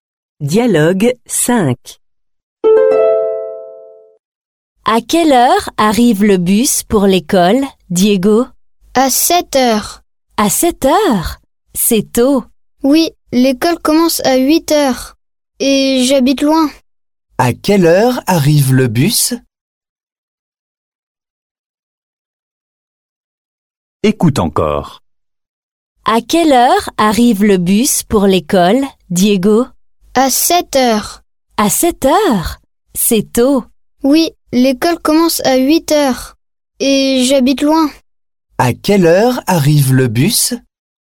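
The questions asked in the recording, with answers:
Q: À quelle heure arrive le bus?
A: à 7 heures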